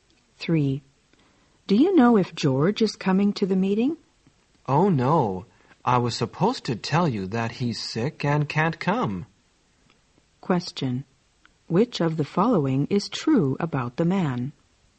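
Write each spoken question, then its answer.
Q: Which of the following is true about the man?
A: He forgot to tell her that George is sick and can't come.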